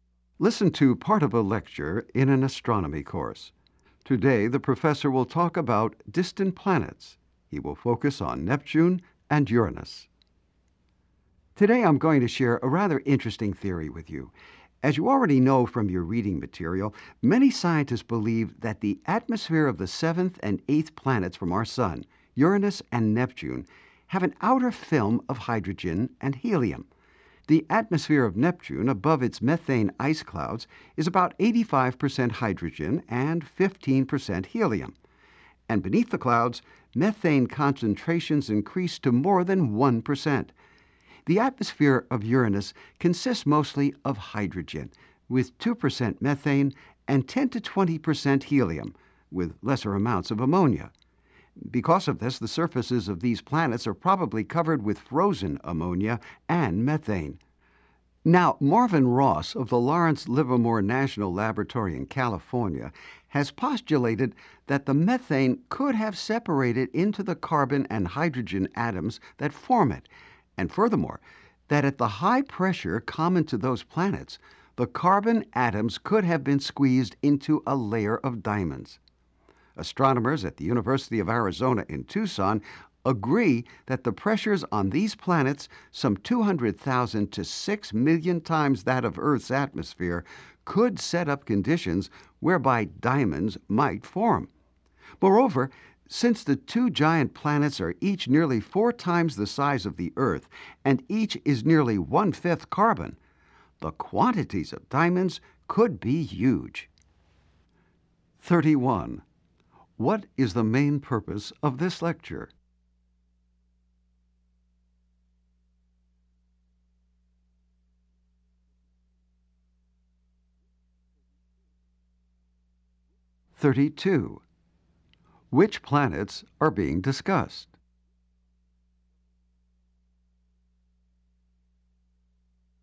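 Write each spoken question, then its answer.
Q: What is the main purpose of this lecture?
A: To explain a theory that diamonds may form on Uranus and Neptune

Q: Which planets are being discussed?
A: Uranus and Neptune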